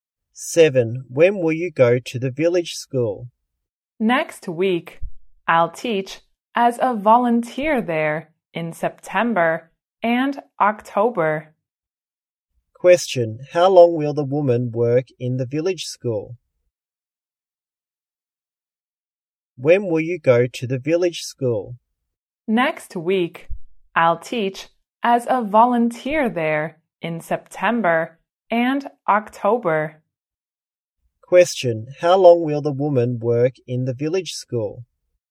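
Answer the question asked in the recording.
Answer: Two months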